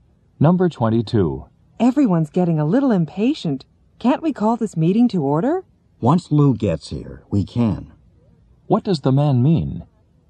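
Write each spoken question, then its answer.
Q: What does the man mean?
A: The meeting can start once Lou arrives.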